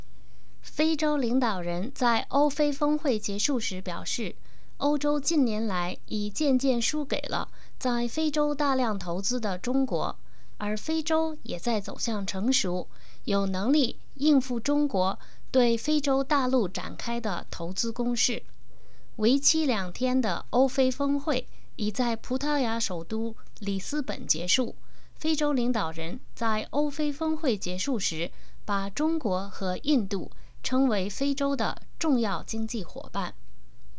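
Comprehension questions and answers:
Please answer the following questions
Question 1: Which two countries were called Africa's important economic partners by African leaders?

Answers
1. China and India

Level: M.Phil Year 2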